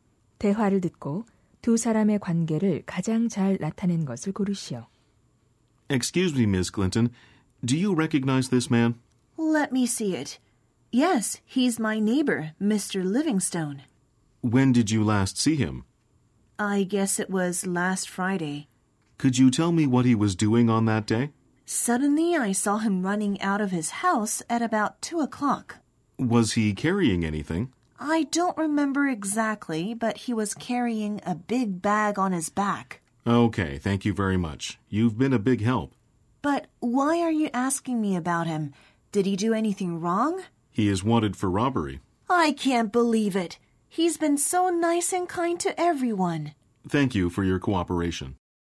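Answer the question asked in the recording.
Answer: 경찰관 - 목격자(이웃)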